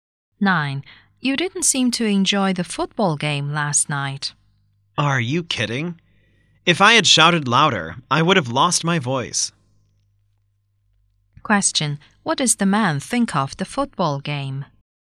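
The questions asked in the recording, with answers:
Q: What does the man think of the football game?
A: He enjoyed it very much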